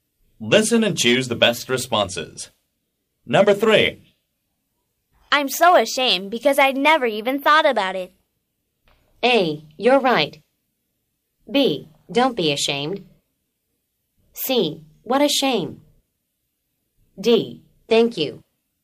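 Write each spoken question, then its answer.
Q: I'm so ashamed because I never even thought about it.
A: B: Don't be ashamed.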